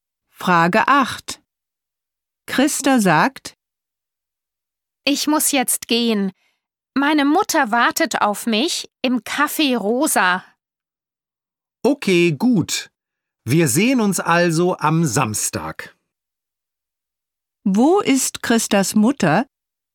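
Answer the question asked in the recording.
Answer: Im Café Rosa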